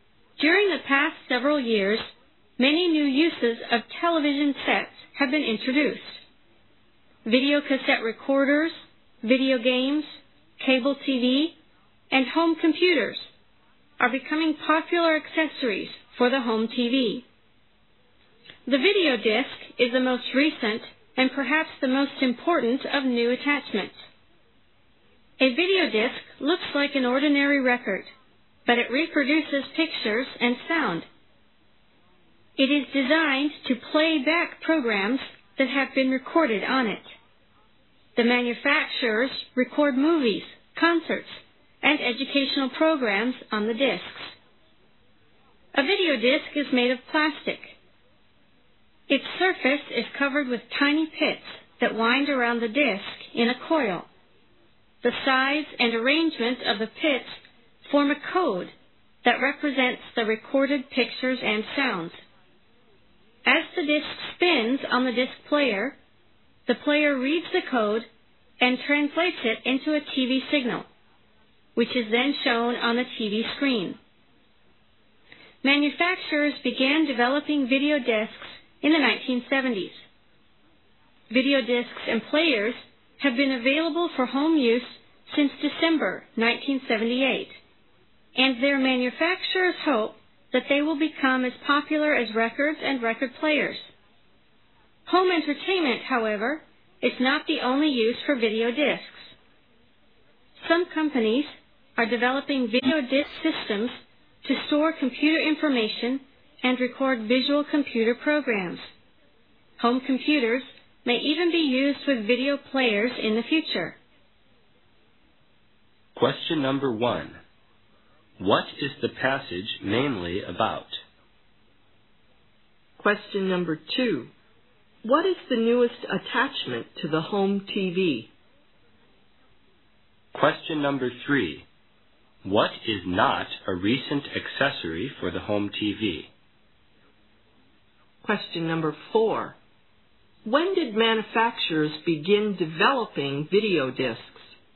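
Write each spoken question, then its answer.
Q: What is the passage mainly about?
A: The video disc

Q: What is the newest attachment to the home TV?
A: The video disc

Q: When did manufacturers begin developing video discs?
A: In the 1970s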